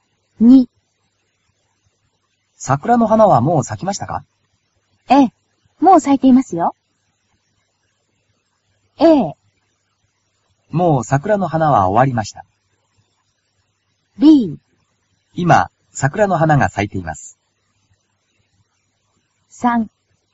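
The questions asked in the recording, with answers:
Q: 桜の花はもう咲きましたか?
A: B: 今、桜の花が咲いています。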